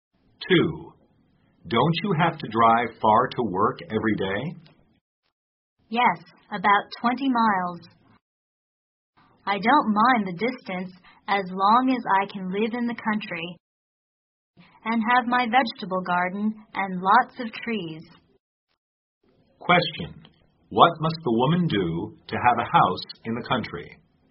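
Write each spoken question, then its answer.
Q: What must the woman do to have a house in the country?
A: Drive about 20 miles to work every day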